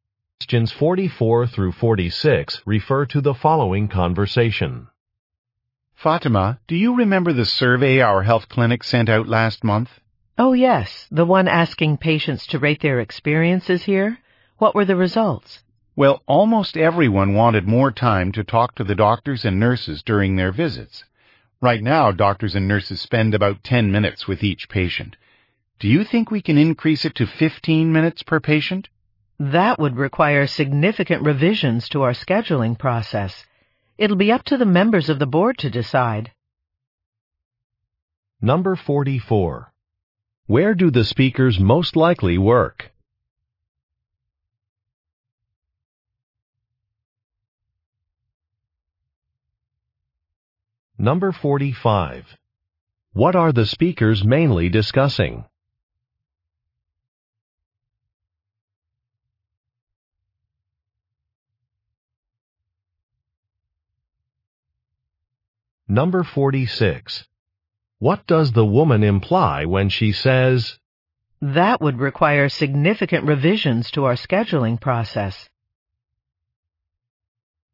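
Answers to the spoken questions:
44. At a health clinic
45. Patient survey results
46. The change would not be easy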